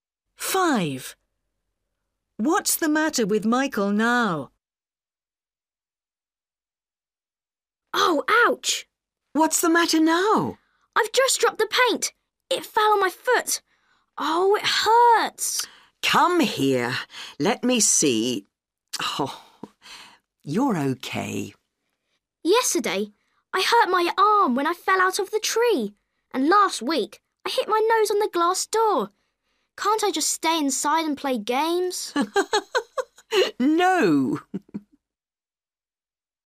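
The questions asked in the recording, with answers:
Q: What's the matter with Michael now?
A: he hurt his foot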